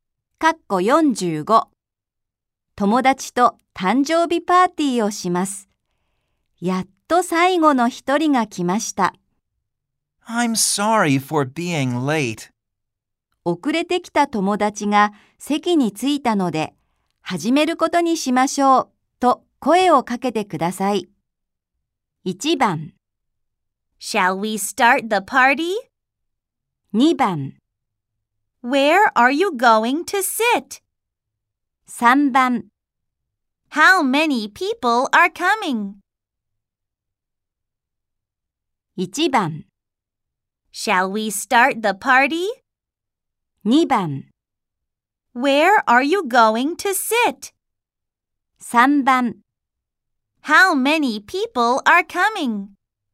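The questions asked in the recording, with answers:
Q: 遅れてきた友達が席に着いたので、始めることにしましょう、と声をかけてください。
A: 1: Shall we start the party?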